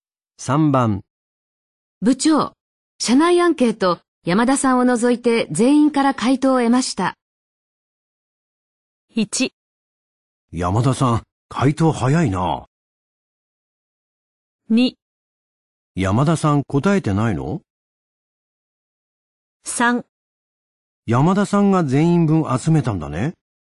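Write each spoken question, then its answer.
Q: 部長、社内アンケート、山田さんを除いて全員から回答を得ました。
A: 2: 山田さん答えてないの?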